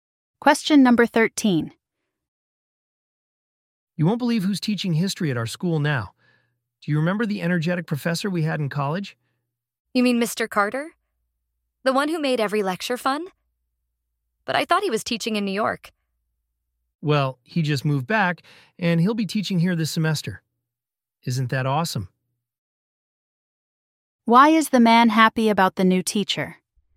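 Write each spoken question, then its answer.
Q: Why is the man happy about the new teacher?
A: He was an energetic professor they had in college who made lectures fun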